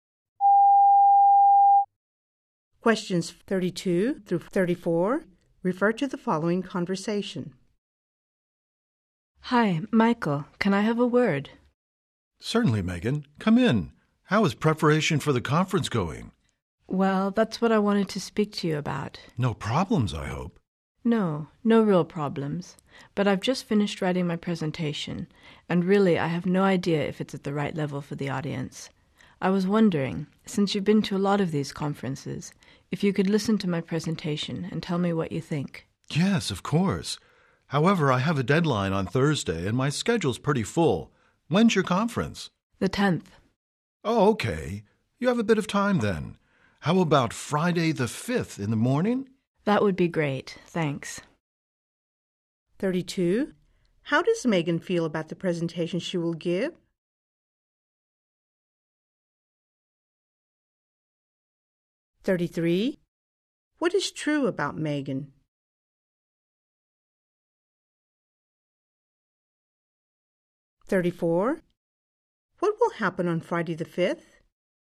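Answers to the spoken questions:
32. Unsure whether it is at the right level for the audience
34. Michael will listen to Megan's presentation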